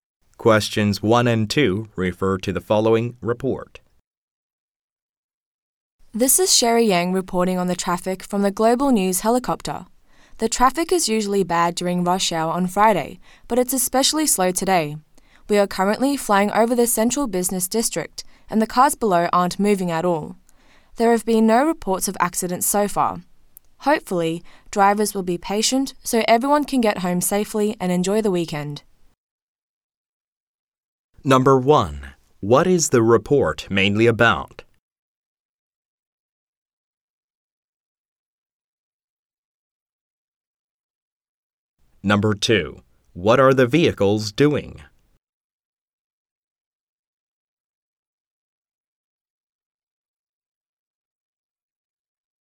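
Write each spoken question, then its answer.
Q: What is the report mainly about?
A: Heavy, slow traffic during Friday rush hour

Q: What are the vehicles doing?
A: They aren't moving at all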